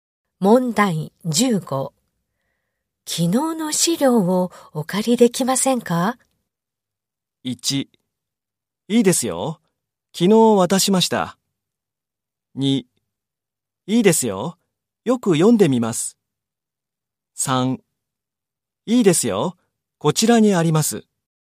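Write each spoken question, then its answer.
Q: 昨日の資料をお借りできませんか?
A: 3: いいですよ。こちらにあります。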